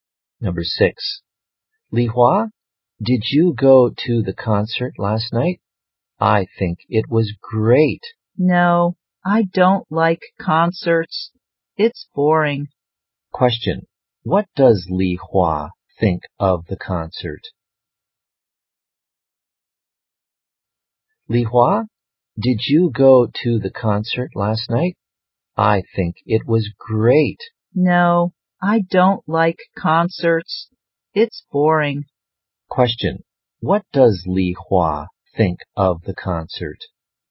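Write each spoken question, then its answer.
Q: what does Li Hua think of the concert?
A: It's boring.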